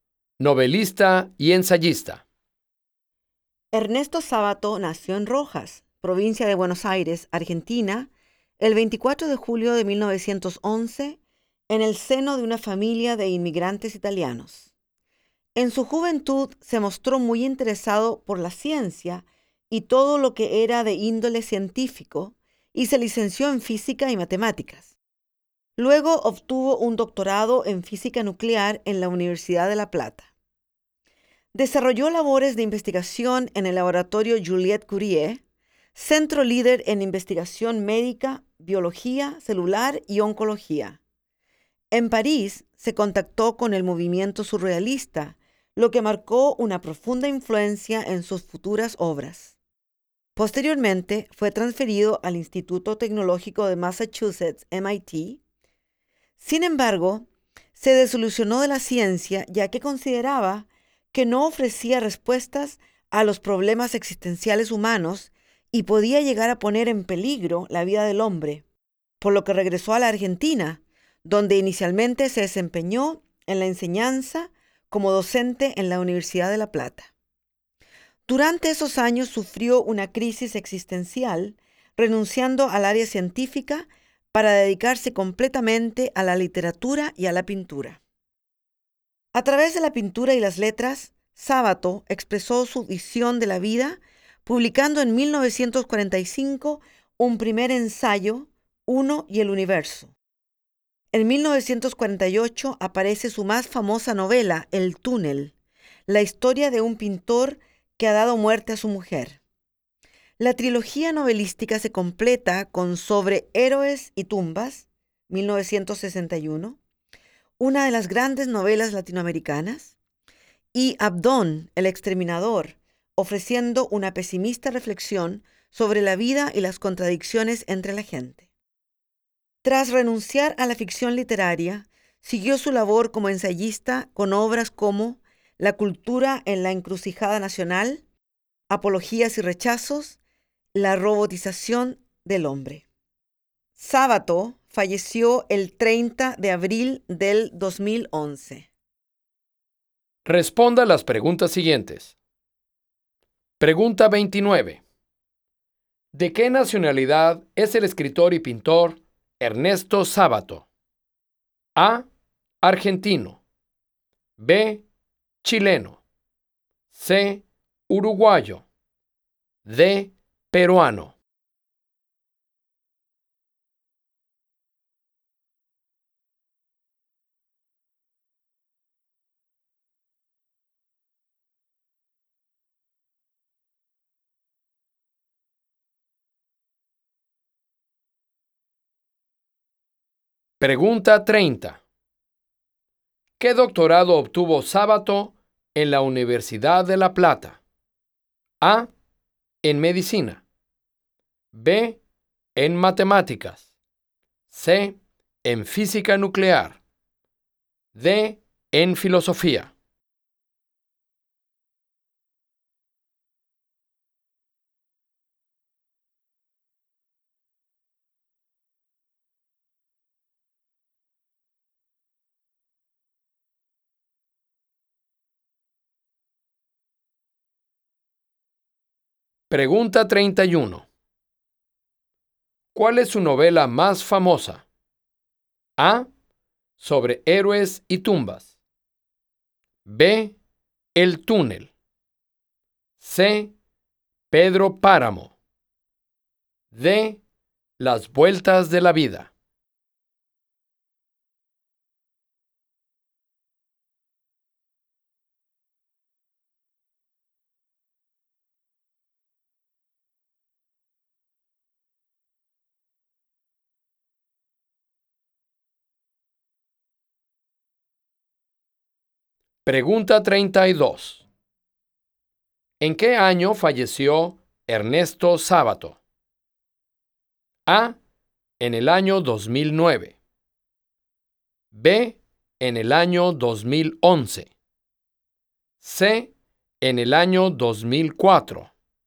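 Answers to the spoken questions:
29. A: Argentino
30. C: En física nuclear
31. B: El túnel
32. B: En el año 2011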